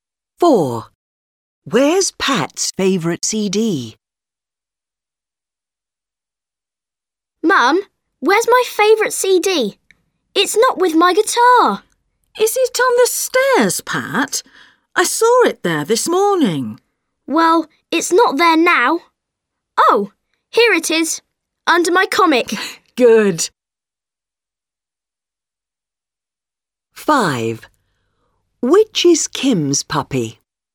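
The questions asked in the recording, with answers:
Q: Where's Pat's favorite CD?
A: Under his comic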